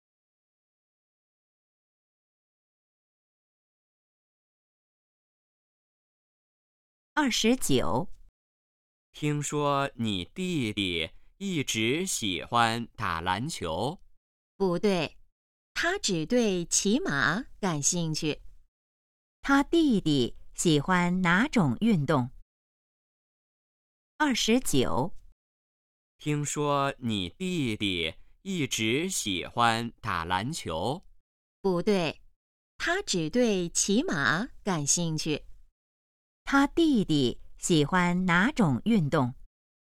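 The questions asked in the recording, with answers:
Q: 他弟弟喜欢哪种运动?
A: 骑马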